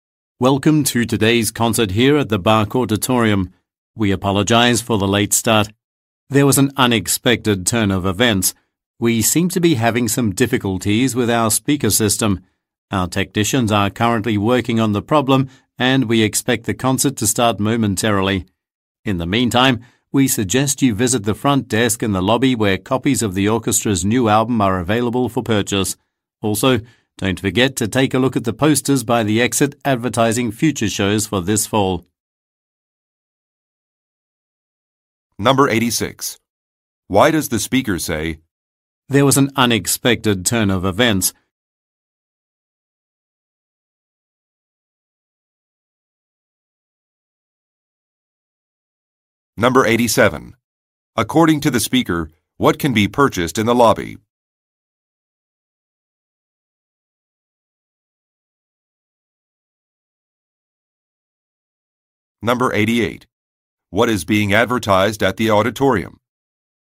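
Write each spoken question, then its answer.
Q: Why does the speaker say, "There was an unexpected turn of events"?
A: To explain why the concert is starting late (speaker system problems)

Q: According to the speaker, what can be purchased in the lobby?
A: Copies of the orchestra's new album

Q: What is being advertised at the auditorium?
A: Future shows for this fall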